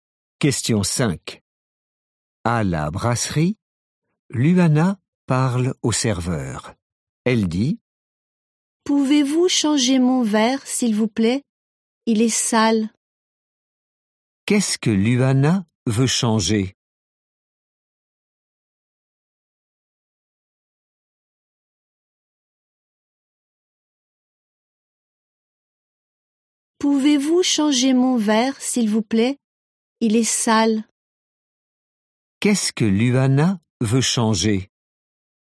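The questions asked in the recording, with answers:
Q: Qu'est-ce que Luana veut changer?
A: Son verre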